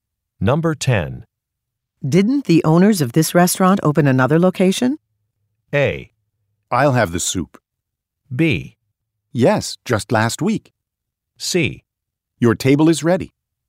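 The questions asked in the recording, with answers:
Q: Didn't the owners of this restaurant open another location?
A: B: Yes, just last week.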